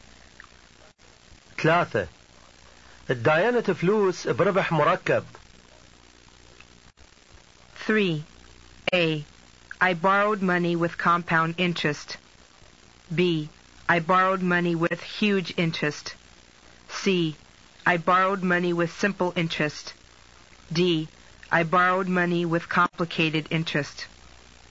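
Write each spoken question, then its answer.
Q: الديانة فلوس بربح مركب.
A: A: I borrowed money with compound interest.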